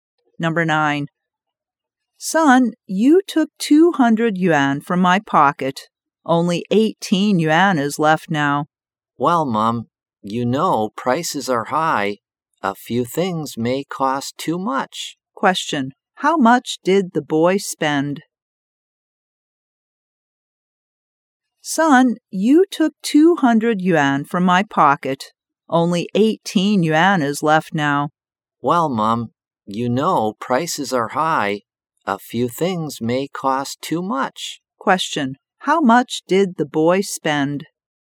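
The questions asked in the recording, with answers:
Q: How much did the boy spend?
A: 182 yuan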